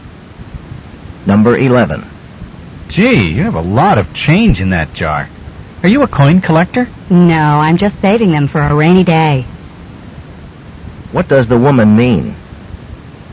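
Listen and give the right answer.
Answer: She is saving the money for a time when she needs it.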